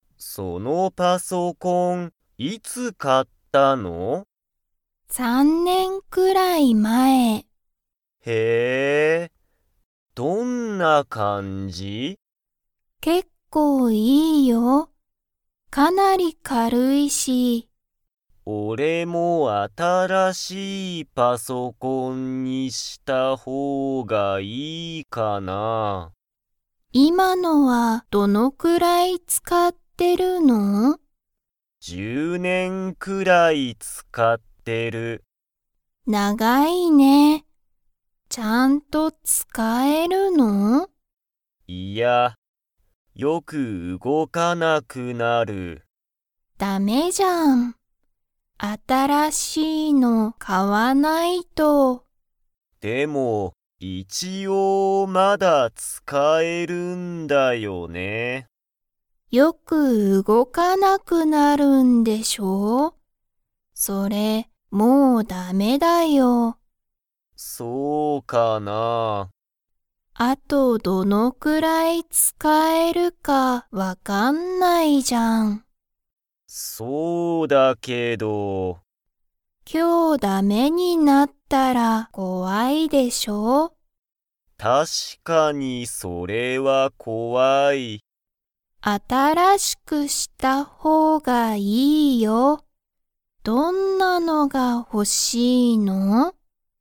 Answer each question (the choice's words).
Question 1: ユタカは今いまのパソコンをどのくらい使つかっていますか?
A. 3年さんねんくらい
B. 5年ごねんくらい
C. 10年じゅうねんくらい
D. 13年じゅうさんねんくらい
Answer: 10年じゅうねんくらい

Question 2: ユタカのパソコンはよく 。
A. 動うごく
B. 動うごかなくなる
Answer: 動うごかなくなる

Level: Level 3